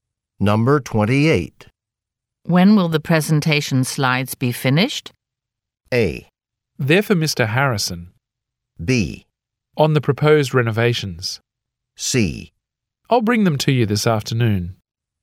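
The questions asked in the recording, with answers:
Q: When will the presentation slides be finished?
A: C: I'll bring them to you this afternoon.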